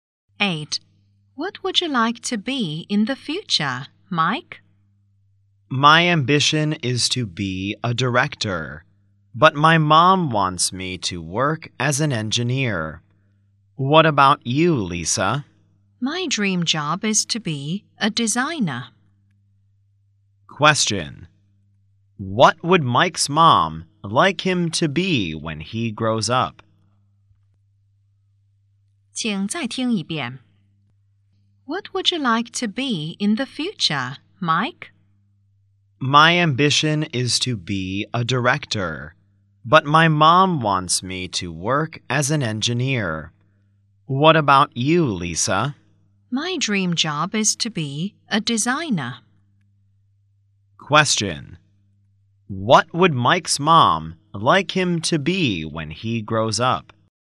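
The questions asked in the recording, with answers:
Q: Question: What would Mike's mom like him to be when he grows up?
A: An engineer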